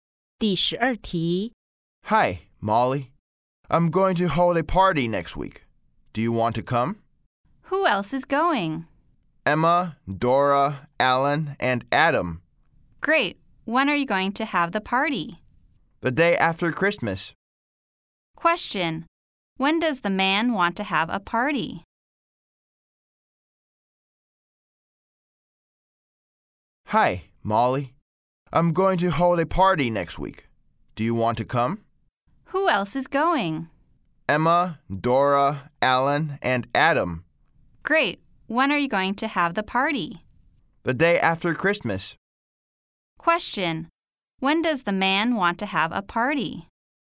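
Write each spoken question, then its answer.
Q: When does the man want to have a party?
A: The day after Christmas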